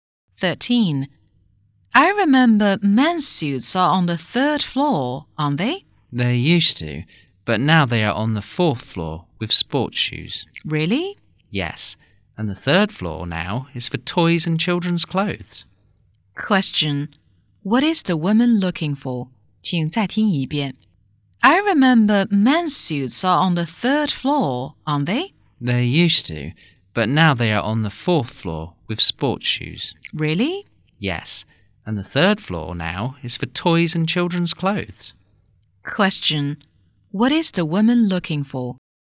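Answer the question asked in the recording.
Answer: Men's suits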